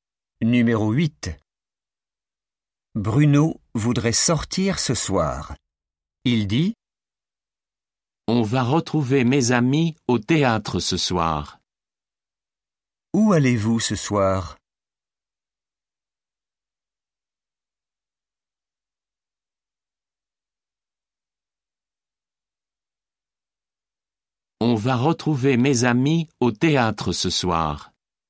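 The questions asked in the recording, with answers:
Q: Où allez-vous ce soir?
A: au théâtre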